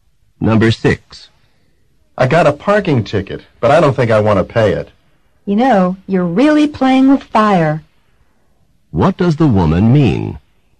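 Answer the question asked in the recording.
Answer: Not paying the ticket is risky.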